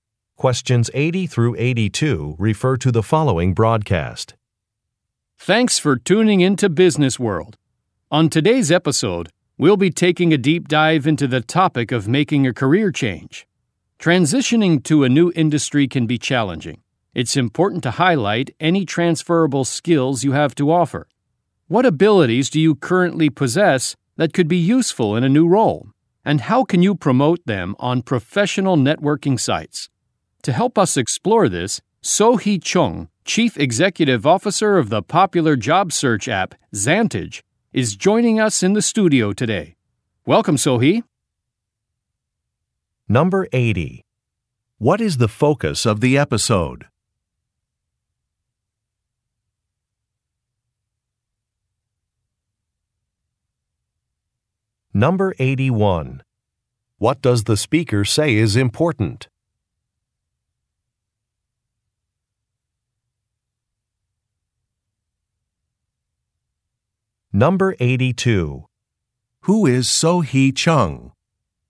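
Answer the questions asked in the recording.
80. Making a career change
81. Highlighting transferable skills
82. CEO of the job search app Zantage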